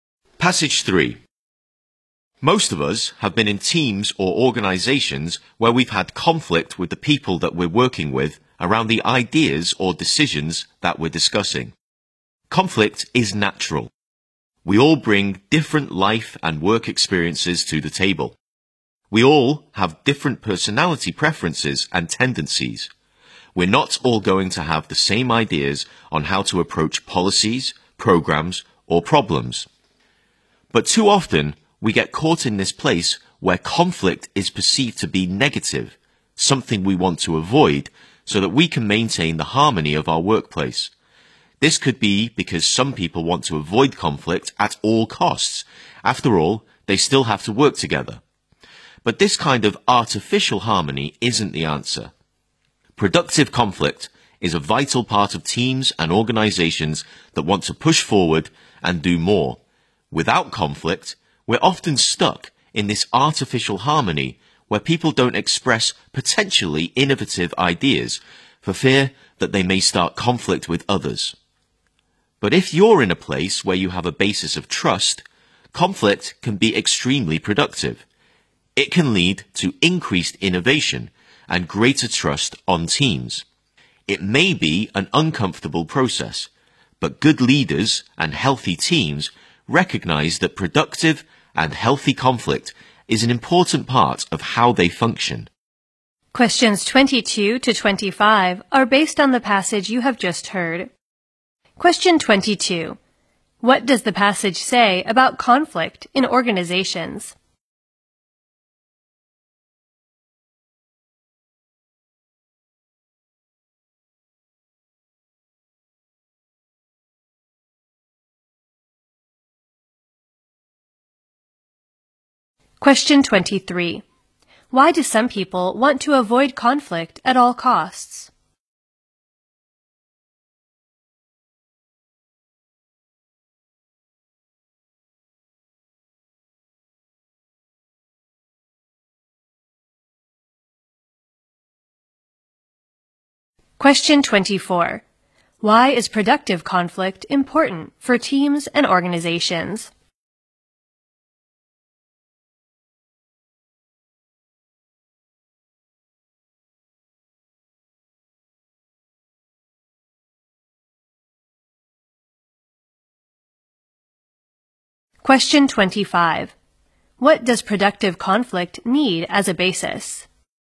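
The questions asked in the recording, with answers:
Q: Why do some people want to avoid conflict at all costs?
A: They still have to work together

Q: Why is productive conflict important for teams and organizations?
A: It helps them push forward and do more, with more innovation and trust

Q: What does productive conflict need as a basis?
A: Trust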